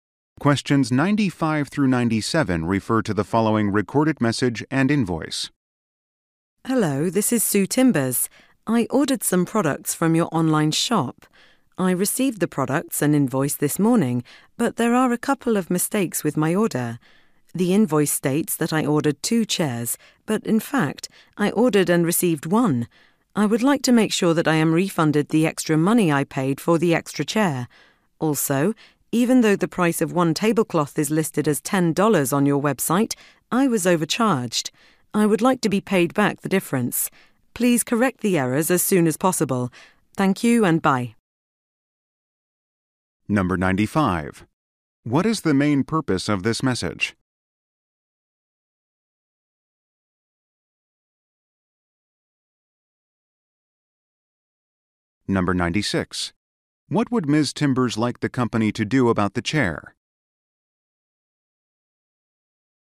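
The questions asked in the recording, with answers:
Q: What is the main purpose of this message?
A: To report mistakes in an order

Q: Timbers like the company to do about the chair?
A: Refund the money paid for the extra chair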